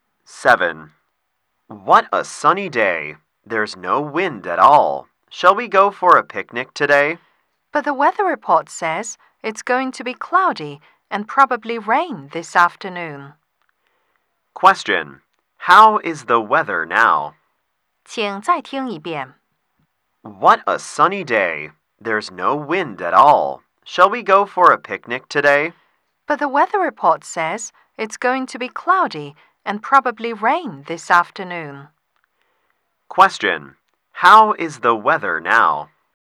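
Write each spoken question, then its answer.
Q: How is the weather now?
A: Sunny with no wind.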